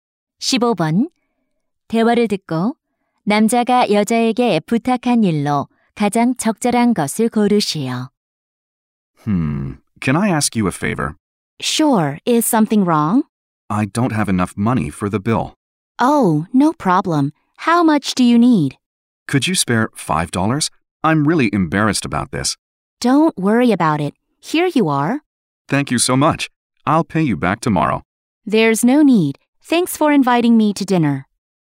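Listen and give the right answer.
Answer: 5달러 빌려주기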